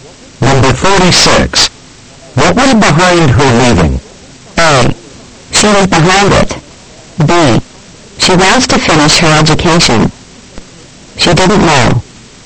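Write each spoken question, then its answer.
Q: What was behind her leaving?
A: B: She wants to finish her education.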